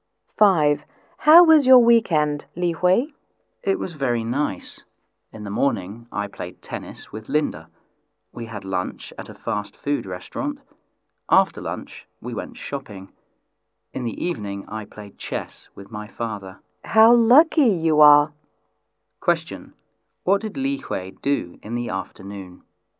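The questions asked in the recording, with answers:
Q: What did Li Hui do in the afternoon?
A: Went shopping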